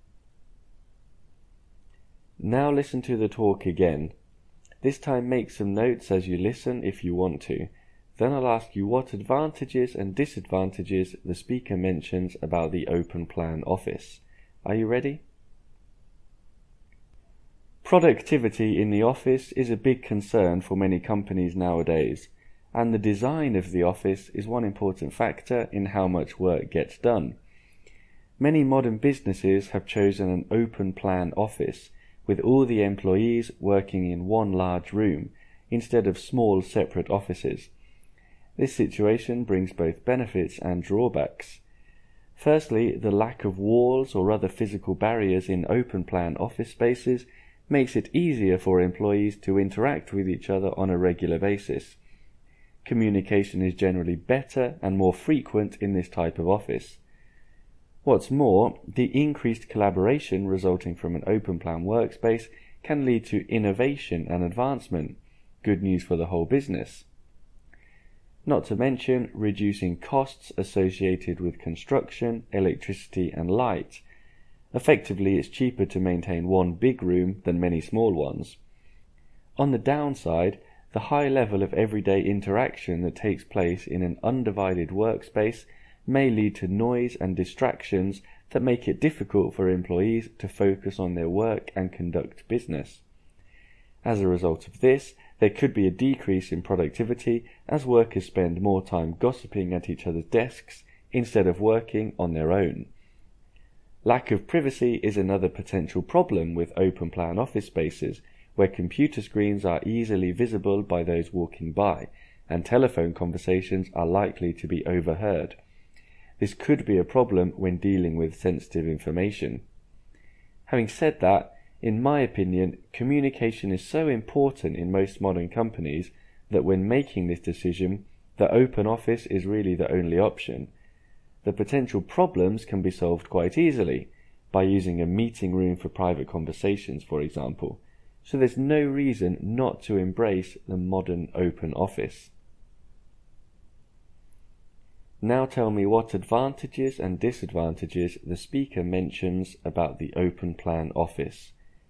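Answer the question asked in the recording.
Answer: Advantages: better, more frequent communication; collaboration leading to innovation; lower costs. Disadvantages: noise and distractions, lower productivity from gossiping, lack of privacy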